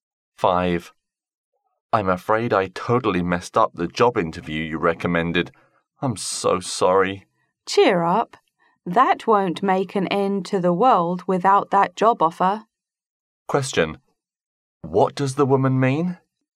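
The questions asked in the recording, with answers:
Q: What does the woman mean?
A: Losing the job offer is not a big deal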